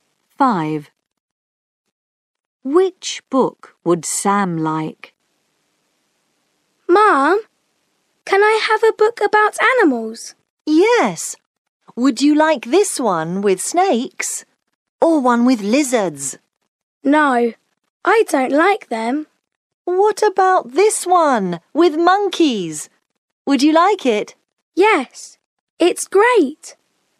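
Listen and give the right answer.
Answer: The one with monkeys.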